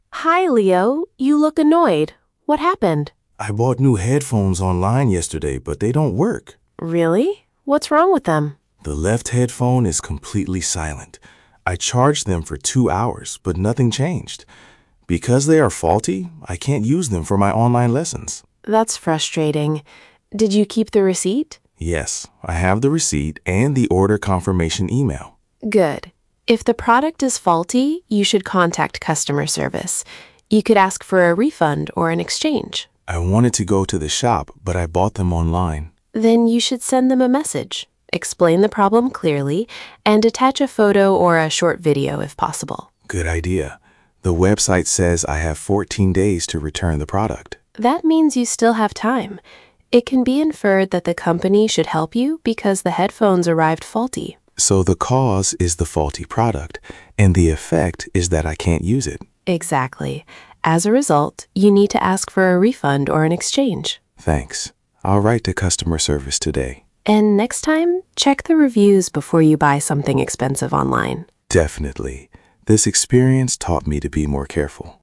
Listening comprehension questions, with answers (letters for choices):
Uzupełnij zdania słowami z nagrania: because, so, as a result, that means:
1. The headphones are faulty, ______ Leo can't use them.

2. Leo should contact customer service ______ the product does not work.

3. The website says he has fourteen days to return the product. ______ he still has time.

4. The product arrived faulty. ______, Leo should ask for a refund or an exchange.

Przeczytaj pytania, a potem posłuchaj i wybierz właściwą odpowiedź.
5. What is Leo's problem?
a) He lost his phone.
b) His new headphones do not work.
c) He forgot his homework.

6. What does Maya advise him to do?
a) ignore the problem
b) contact customer service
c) buy another pair immediately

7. What did Leo learn from the situation?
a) to check reviews before buying expensive things online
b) to stop using headphones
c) to avoid online lessons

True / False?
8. Leo bought the headphones in a physical shop.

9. The left headphone is silent.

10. Leo threw away the receipt.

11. Maya tells Leo to contact customer service.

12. Leo has fourteen days to return the product.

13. Maya says he should check reviews next time.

Uzupełnij tabelę informacjami z nagrania:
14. Cause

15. Effect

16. Evidence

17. Inference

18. Advice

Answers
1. so
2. because
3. That means
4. As a result
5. b
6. b
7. a
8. False
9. True
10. False
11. True
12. True
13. True
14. The headphones are faulty / the left headphone is silent.
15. Leo cannot use them for online lessons.
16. He charged them for two hours, but nothing changed.
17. The company should help because the product arrived faulty.
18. Contact customer service and ask for a refund or an exchange.

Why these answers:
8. he bought them online.
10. he has the receipt and the order confirmation email.

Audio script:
Maya: Hi, Leo. You look annoyed. What happened?
Leo: I bought new headphones online yesterday, but they don't work.
Maya: Really? What's wrong with them?
Leo: The left headphone is completely silent. I charged them for two hours, but nothing changed. Because they are faulty, I can't use them for my online lessons.
Maya: That's frustrating. Did you keep the receipt?
Leo: Yes, I have the receipt and the order confirmation email.
Maya: Good. If the product is faulty, you should contact customer service. You could ask for a refund or an exchange.
Leo: I wanted to go to the shop, but I bought them online.
Maya: Then you should send them a message. Explain the problem clearly and attach a photo or a short video if possible.
Leo: Good idea. The website says I have fourteen days to return the product.
Maya: That means you still have time. It can be inferred that the company should help you because the headphones arrived faulty.
Leo: So the cause is the faulty product, and the effect is that I can't use it.
Maya: Exactly. As a result, you need to ask for a refund or an exchange.
Leo: Thanks. I'll write to customer service today.
Maya: And next time, check the reviews before you buy something expensive online.

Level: A2+/B1